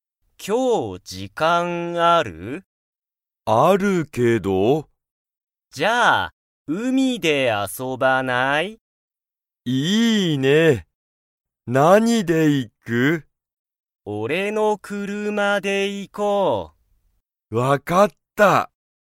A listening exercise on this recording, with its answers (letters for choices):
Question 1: たかしとゆたかは、海(うみ)に____で行(い)く。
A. たかしの時間(じかん)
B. ゆたかの時間(じかん))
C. たかしの車(くるま)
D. ゆたかの車(くるま)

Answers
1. C

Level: Level 1